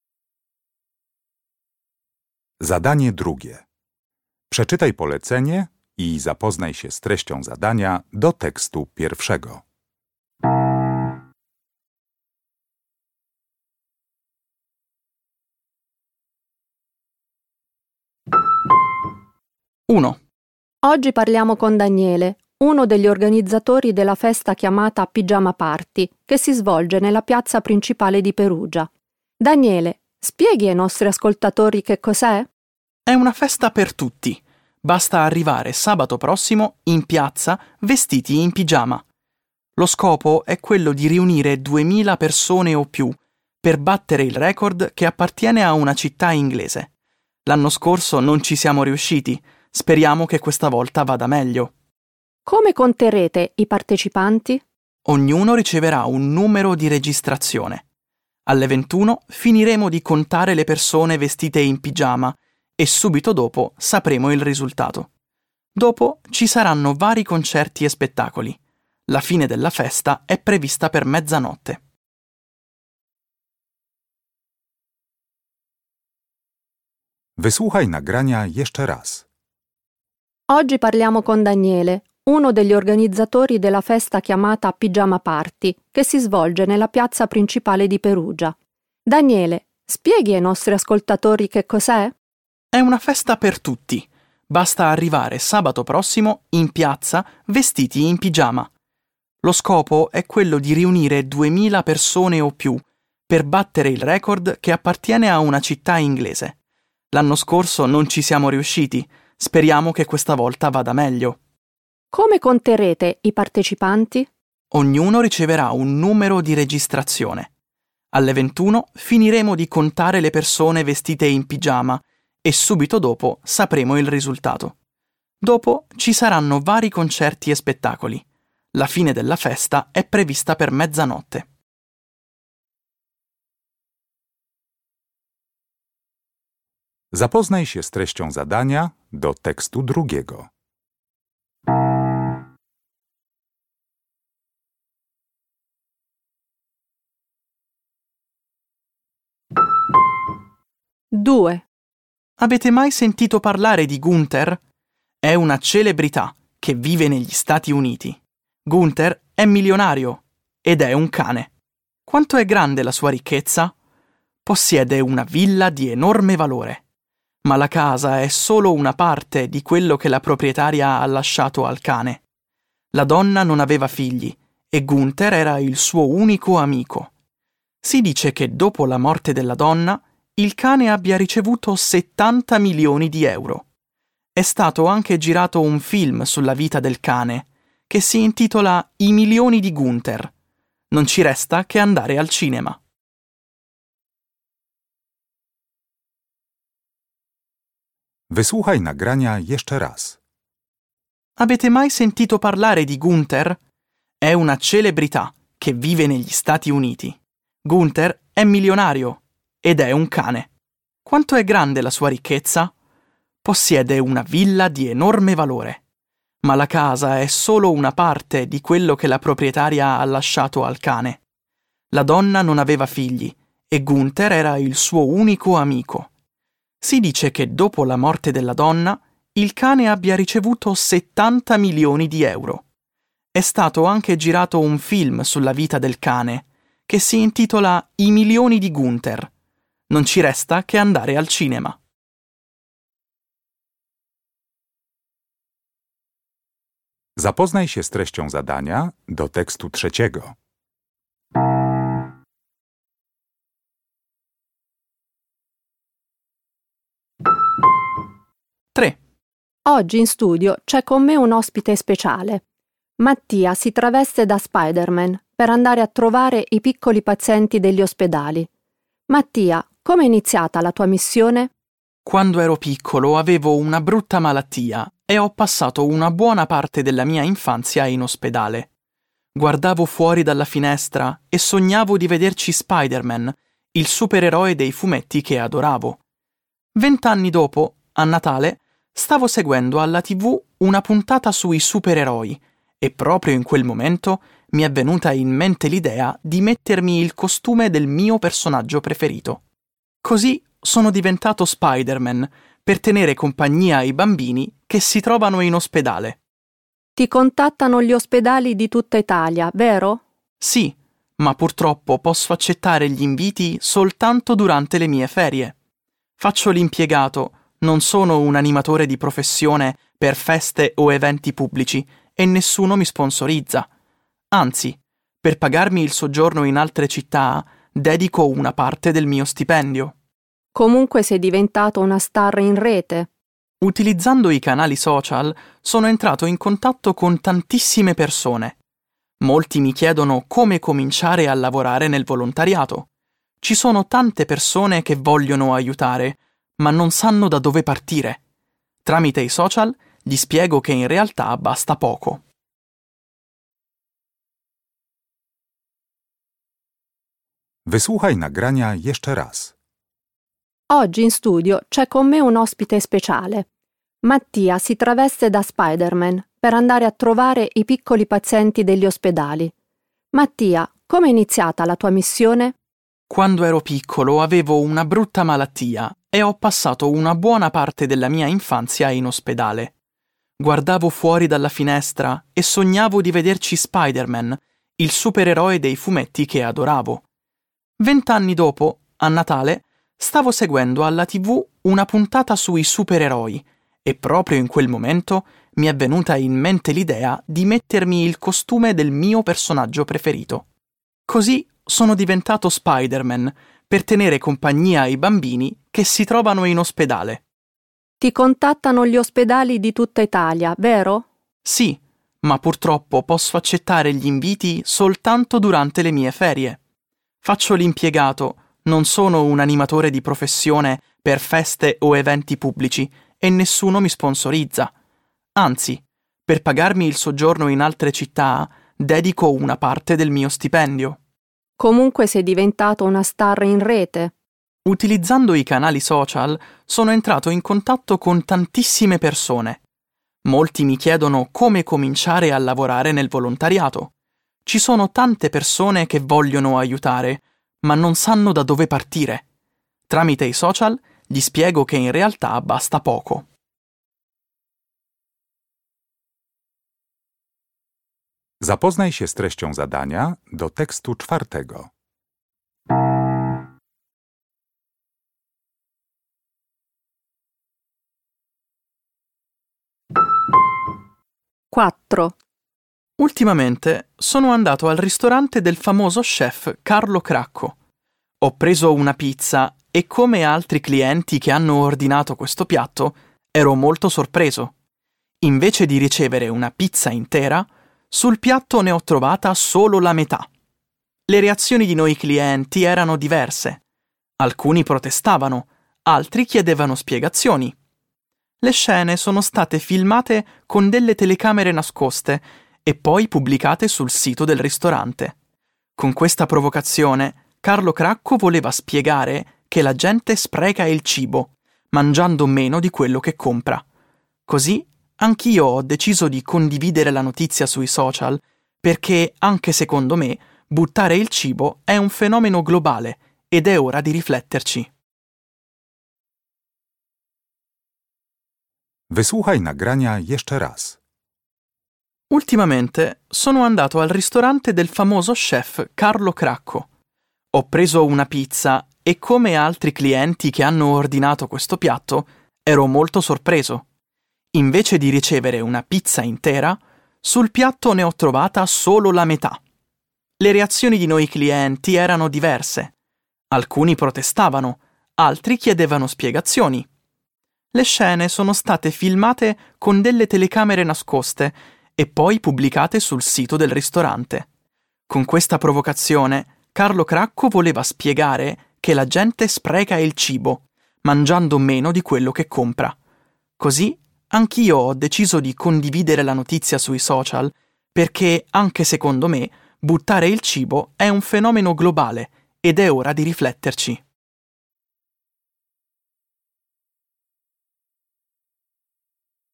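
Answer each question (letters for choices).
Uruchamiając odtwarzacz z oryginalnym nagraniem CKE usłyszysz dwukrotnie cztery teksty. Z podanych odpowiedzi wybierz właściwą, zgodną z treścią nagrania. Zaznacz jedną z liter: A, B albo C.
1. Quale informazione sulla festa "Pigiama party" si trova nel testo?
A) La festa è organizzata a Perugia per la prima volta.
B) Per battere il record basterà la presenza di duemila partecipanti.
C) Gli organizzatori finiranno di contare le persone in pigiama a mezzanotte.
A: B

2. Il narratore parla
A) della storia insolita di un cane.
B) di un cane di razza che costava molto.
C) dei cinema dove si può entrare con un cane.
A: A

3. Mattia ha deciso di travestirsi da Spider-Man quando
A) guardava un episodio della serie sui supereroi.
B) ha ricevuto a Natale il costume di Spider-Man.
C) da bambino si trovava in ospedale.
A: A

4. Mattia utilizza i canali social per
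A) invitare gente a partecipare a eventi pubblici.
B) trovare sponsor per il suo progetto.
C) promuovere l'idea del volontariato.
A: C

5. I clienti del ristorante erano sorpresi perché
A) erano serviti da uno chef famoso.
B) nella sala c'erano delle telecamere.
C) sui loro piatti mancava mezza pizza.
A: C

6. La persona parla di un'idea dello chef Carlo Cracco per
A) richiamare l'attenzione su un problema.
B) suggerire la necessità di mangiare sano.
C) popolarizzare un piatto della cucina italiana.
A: A

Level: Poziom: podstawowy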